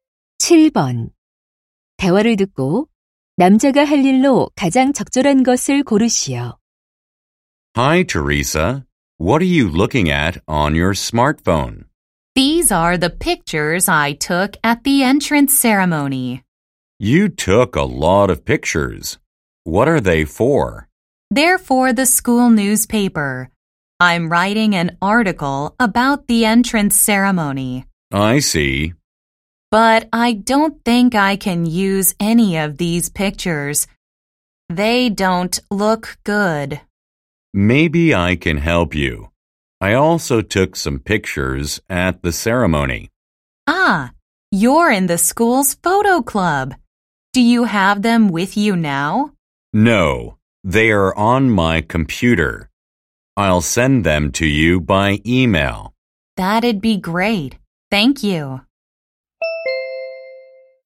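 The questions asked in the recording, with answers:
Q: 대화를 듣고 남자가 할 일로 가장 적절한 것을 고르시오.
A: 사진을 이메일로 보내기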